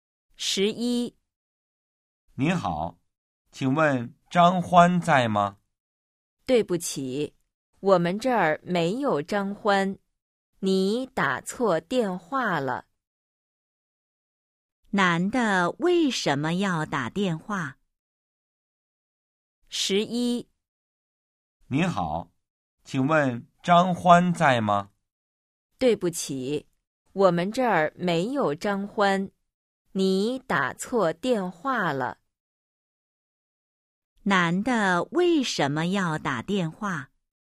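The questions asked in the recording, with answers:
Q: 男的为什么要打电话?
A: 找张欢(打错电话了)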